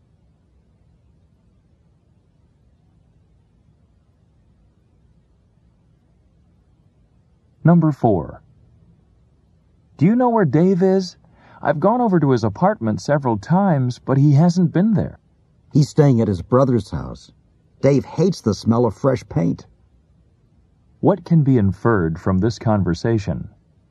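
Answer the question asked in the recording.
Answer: Dave's apartment is being painted.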